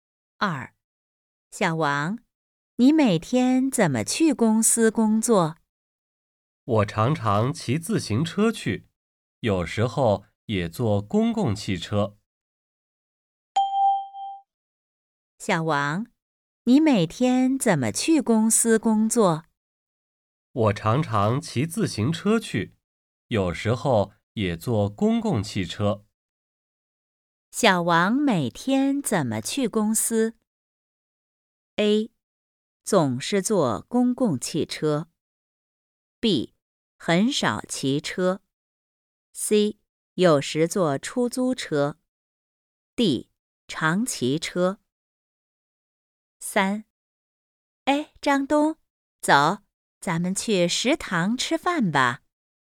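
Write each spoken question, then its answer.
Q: 小王每天怎么去公司?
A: D: 常骑车。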